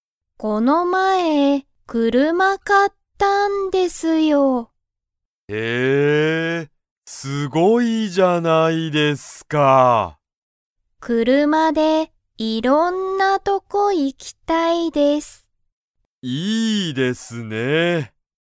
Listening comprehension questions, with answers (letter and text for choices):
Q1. 加藤(かとう)さんは車(くるま)で、いろんな____に行(い)きたい。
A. とこ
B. 学校(がっこう)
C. レストラン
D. ご飯(はん)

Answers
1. A. とこ

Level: Level 1